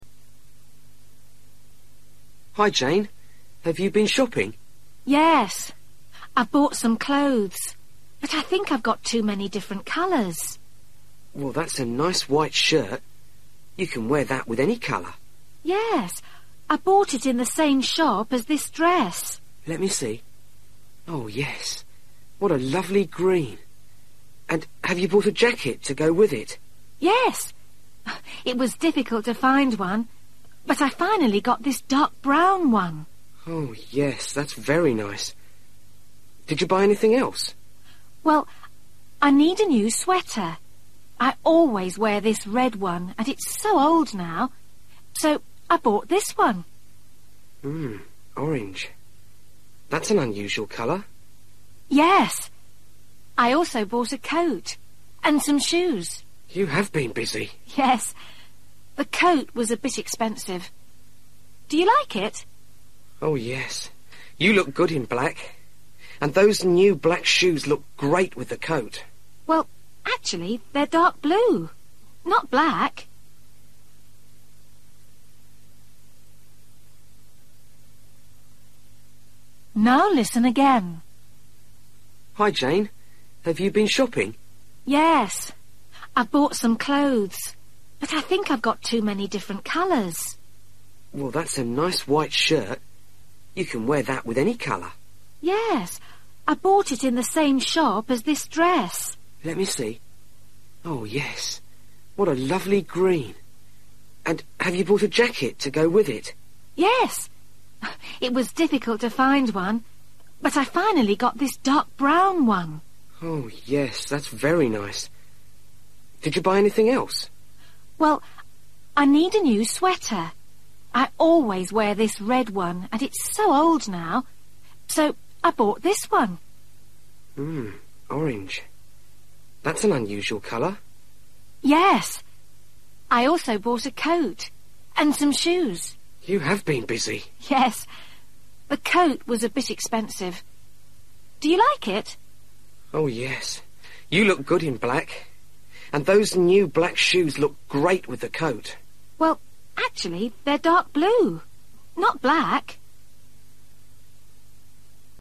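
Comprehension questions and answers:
For each question, choose the correct answer.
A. black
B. blue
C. brown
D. green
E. grey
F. orange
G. red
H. white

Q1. dress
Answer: green

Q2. jacket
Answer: brown

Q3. sweater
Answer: orange

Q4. coat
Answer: black

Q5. shoes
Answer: blue

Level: Luyện nghe trình độ A2

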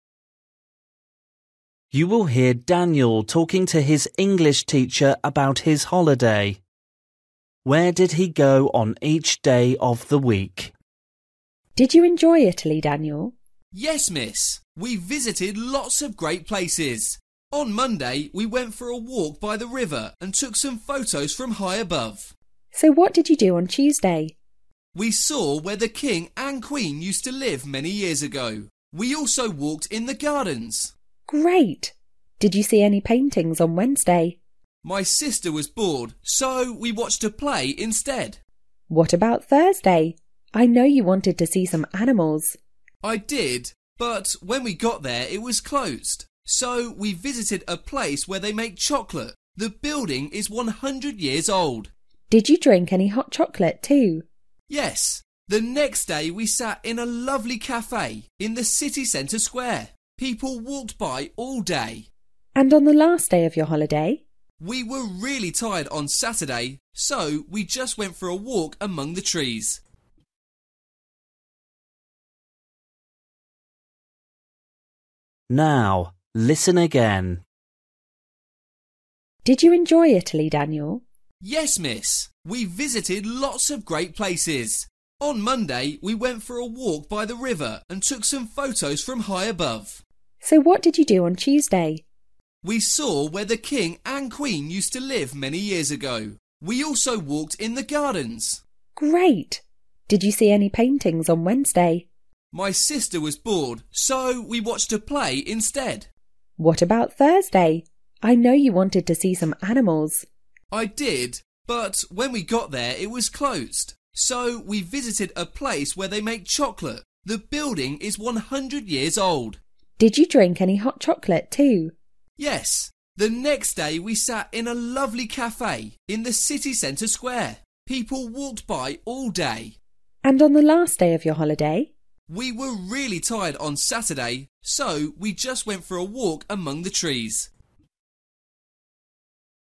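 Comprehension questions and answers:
For each question, choose the correct answer.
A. old castle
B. factory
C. bridge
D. art exhibition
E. theatre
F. zoo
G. park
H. square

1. Tuesday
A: old castle

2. Wednesday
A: theatre

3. Thursday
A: factory

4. Friday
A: square

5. Saturday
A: park

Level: Luyện nghe trình độ A2

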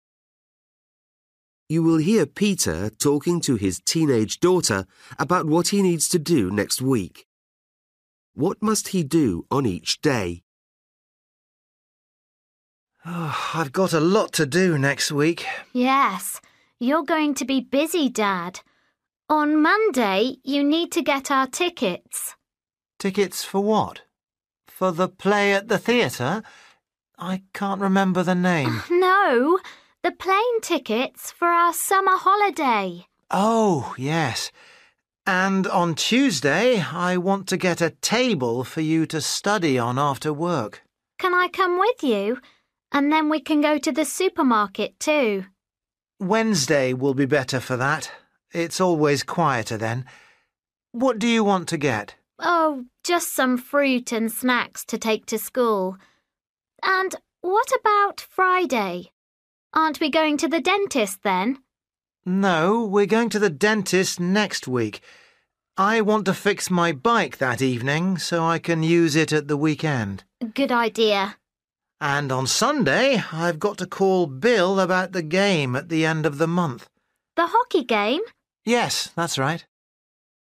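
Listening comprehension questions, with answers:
For each question, choose the correct answer.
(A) visit dentist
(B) collect flight tickets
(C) repair bike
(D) get theatre tickets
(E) play hockey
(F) phone friend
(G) do food shopping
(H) buy desk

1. Monday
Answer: collect flight tickets

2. Tuesday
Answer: buy desk

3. Wednesday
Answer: do food shopping

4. Friday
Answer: repair bike

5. Sunday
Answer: phone friend

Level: Luyện nghe trình độ A2

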